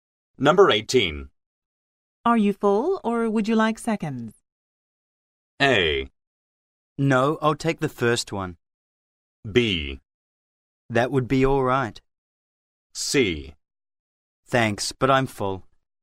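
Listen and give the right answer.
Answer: C: Thanks, but I'm full.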